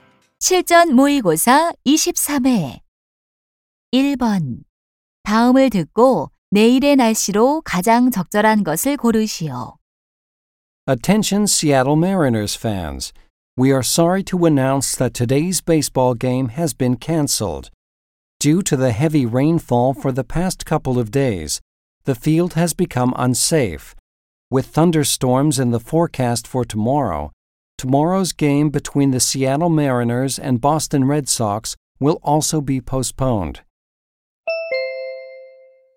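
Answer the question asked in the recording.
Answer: 뇌우(천둥번개를 동반한 비)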